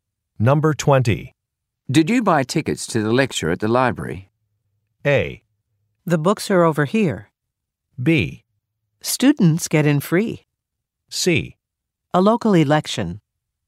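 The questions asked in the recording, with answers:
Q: Did you buy tickets to the lecture at the library?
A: B: Students get in free.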